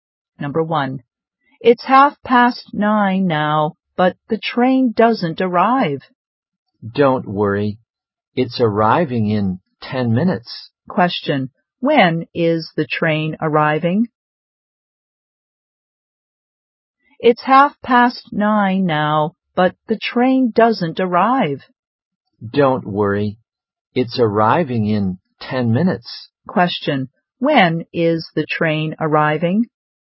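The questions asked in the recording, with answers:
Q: when is the train arriving?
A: At twenty to ten (in 10 minutes)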